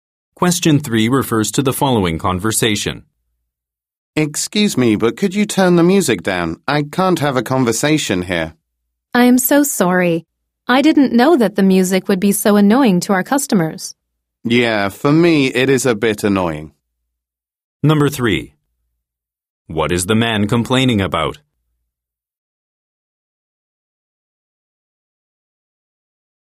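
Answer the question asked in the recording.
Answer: The music is too loud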